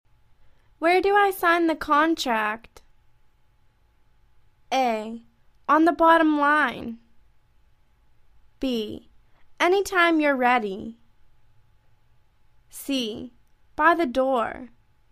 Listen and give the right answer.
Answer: On the bottom line.